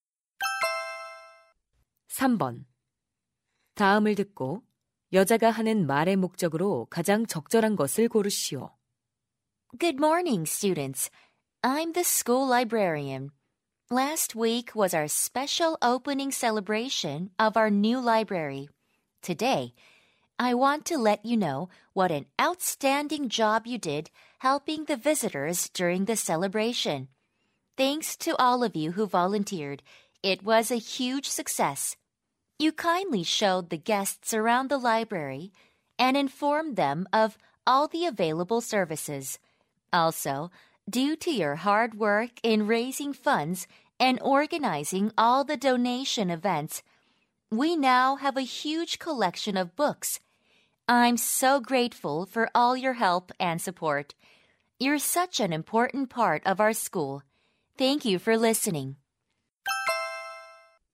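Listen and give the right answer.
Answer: 도서관 개관 행사를 도운 학생 자원봉사자들에게 감사하려고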